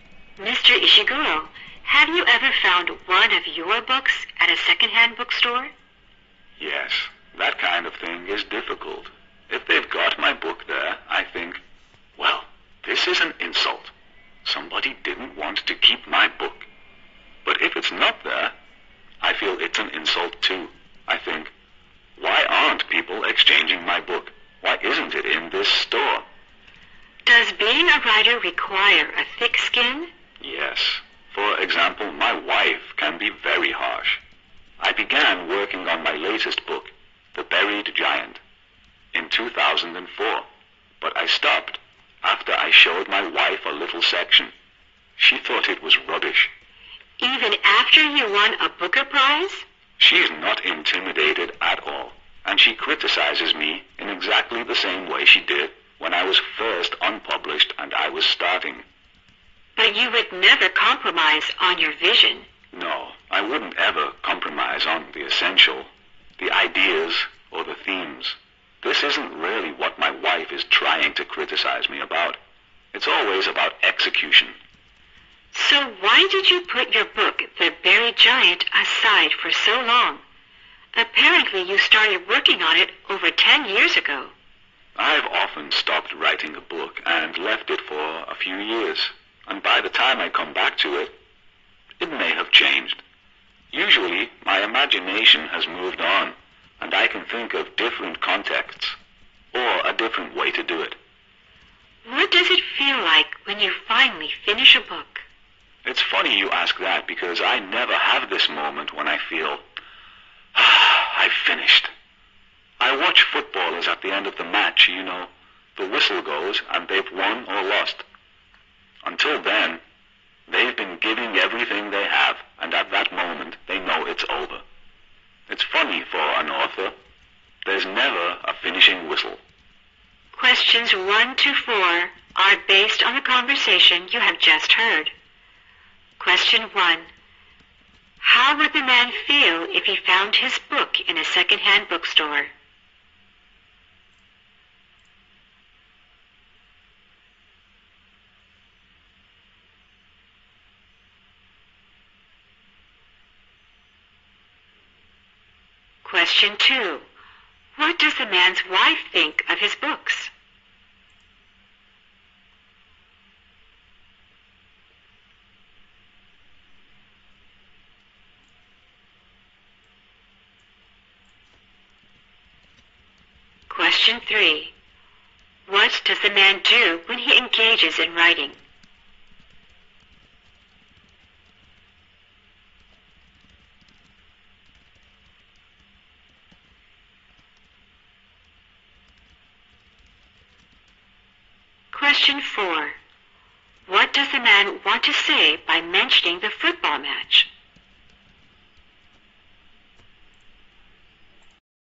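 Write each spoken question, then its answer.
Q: How would the man feel if he found his book in a secondhand bookstore?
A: He would feel insulted.

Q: What does the man's wife think of his books?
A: She is harshly critical of them, especially of how he executes his ideas.

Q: What does the man want to say by mentioning the football match?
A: For an author there is never a moment when he feels the book is finished.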